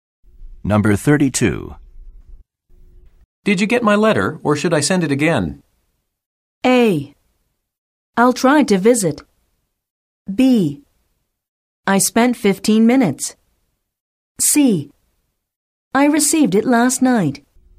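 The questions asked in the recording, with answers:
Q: Did you get my letter, or should I send it again?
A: C: I received it last night.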